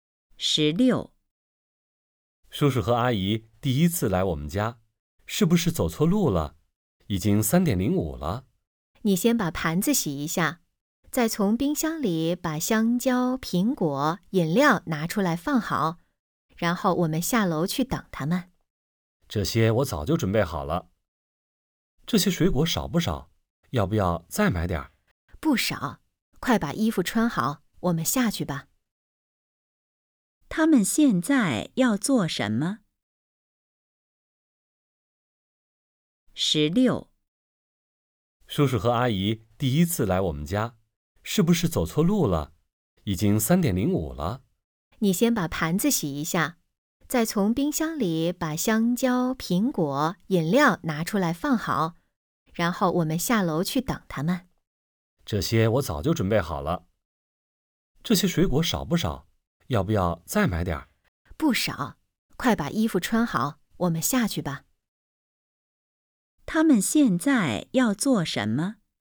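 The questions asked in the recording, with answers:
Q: 他们现在要做什么?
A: 下楼去等叔叔阿姨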